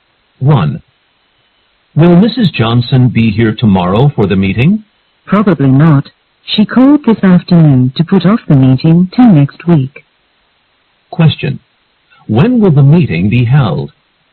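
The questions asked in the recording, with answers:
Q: When will the meeting be held?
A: Next week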